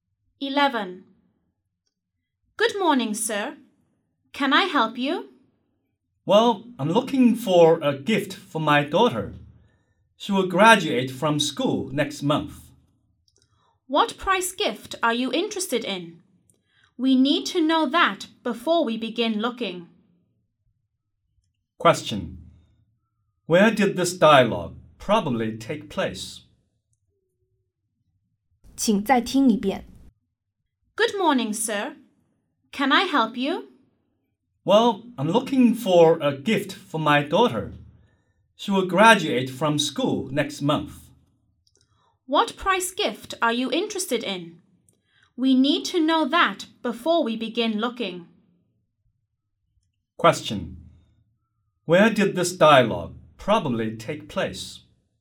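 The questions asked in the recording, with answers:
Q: Where did this dialogue probably take place?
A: In a shop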